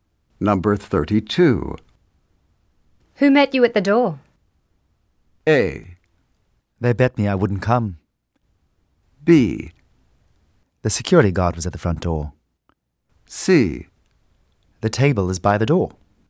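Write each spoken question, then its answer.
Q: Who met you at the door?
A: B: The security guard was at the front door.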